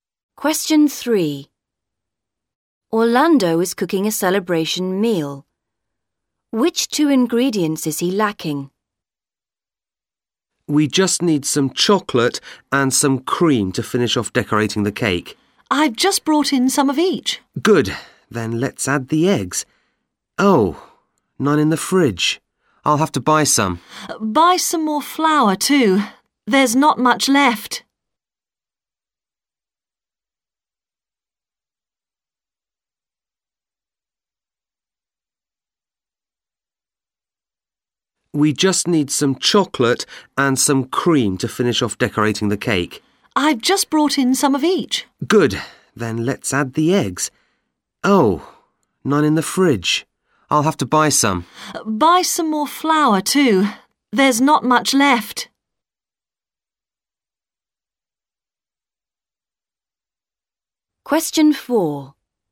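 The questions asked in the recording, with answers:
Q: Which 2 ingredients is he lacking?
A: Eggs and flour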